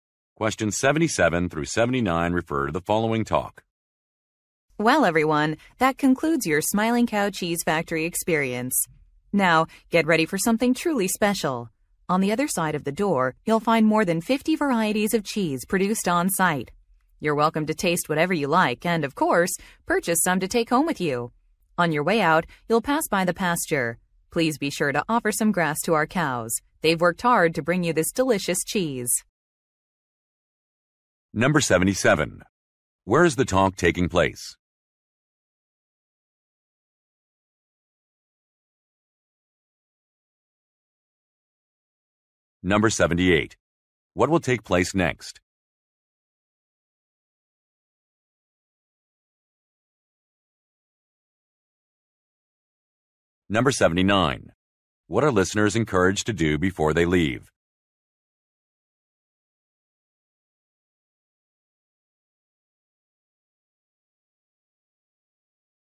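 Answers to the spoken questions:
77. At a cheese factory
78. A cheese tasting
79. Feed grass to the cows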